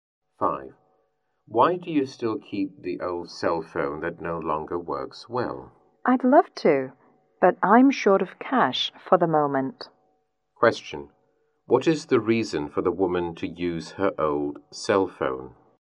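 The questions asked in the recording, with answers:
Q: What is the reason for the woman to use her old cell phone?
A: She is short of cash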